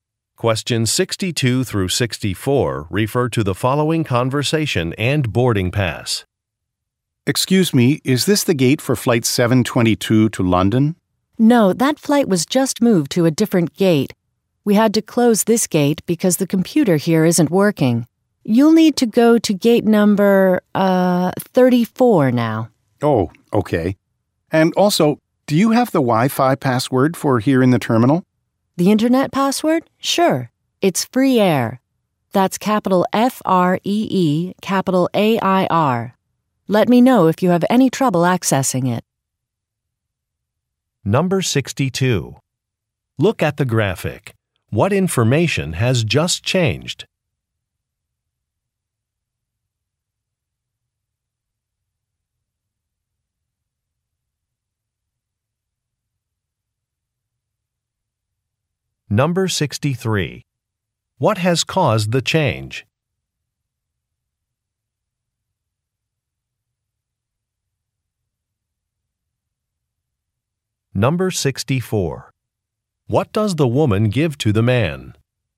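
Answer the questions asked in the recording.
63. A computer at the gate isn't working
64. The Wi-Fi password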